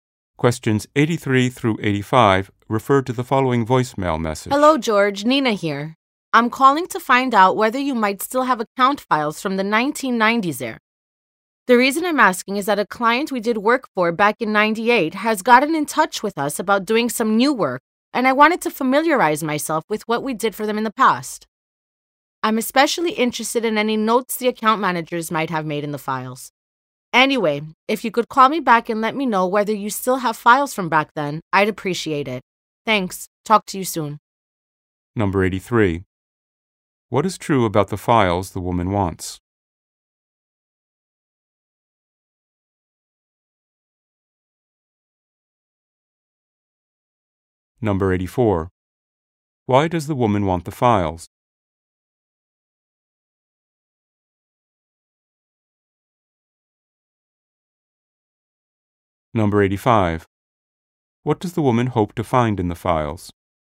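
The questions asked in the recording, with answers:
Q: Why does the woman want the files?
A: A past client wants new work done

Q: What does the woman hope to find in the files?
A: Notes made by account managers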